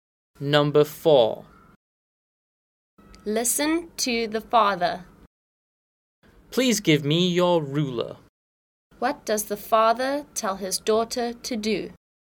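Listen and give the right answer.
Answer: Give him her ruler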